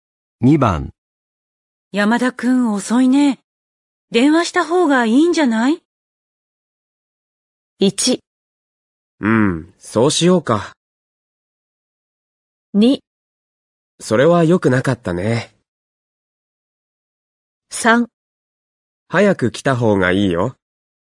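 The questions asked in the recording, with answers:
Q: 山田くん遅いね。電話した方がいいんじゃない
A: 1: うん、そうしようか。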